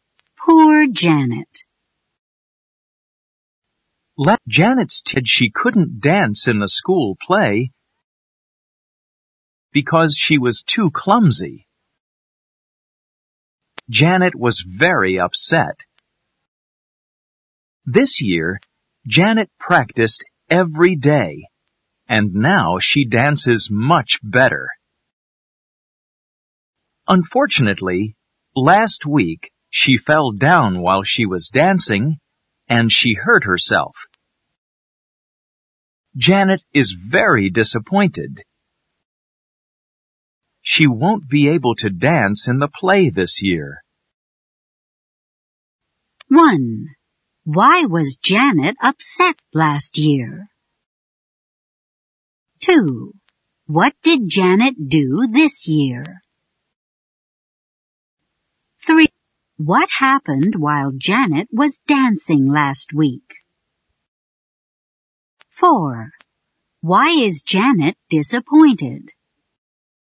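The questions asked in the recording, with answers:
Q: Why was Janet upset last year?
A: She couldn't dance in the school play because she was too clumsy.

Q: What did Janet do this year?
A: She practiced every day.

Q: What happened while Janet was dancing last week?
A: She fell down and hurt herself.

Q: Why is Janet disappointed?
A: She won't be able to dance in the play this year.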